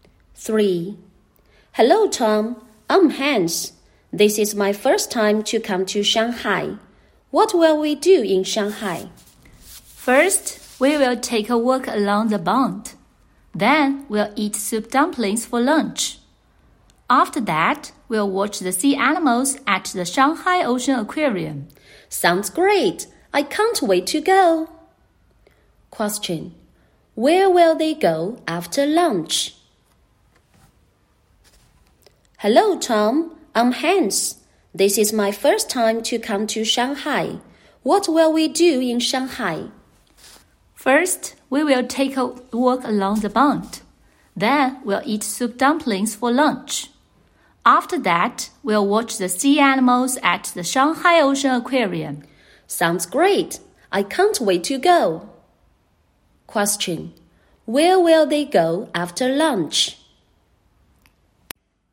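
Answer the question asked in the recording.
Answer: The Shanghai Ocean Aquarium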